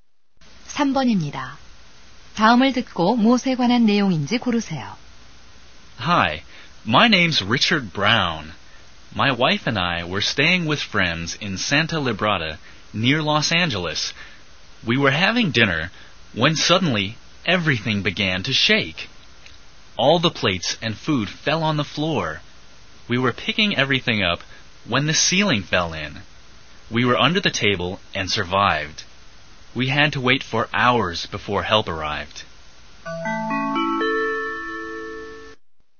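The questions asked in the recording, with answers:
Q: 다음을 듣고 무엇에 관한 내용인지 고르세요.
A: 지진 경험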